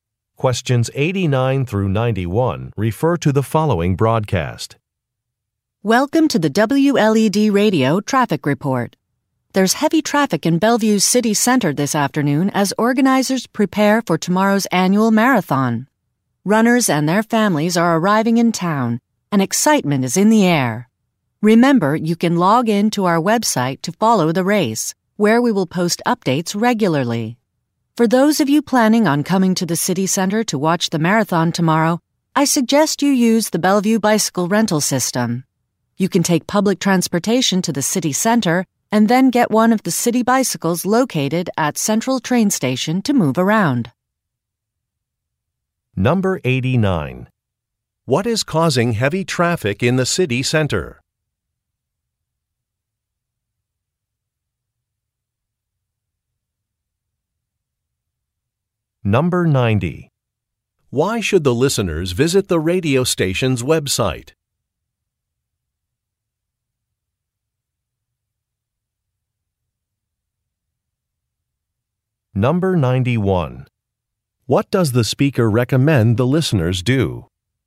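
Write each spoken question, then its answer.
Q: What is causing heavy traffic in the city center?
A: Preparations for the annual marathon

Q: Why should the listeners visit the radio station's website?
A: To follow race updates

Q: What does the speaker recommend the listeners do?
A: Use the bicycle rental system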